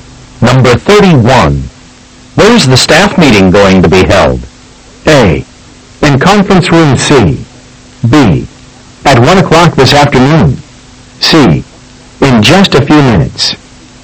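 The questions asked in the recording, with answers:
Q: Where is the staff meeting going to be held?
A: A: In conference room C.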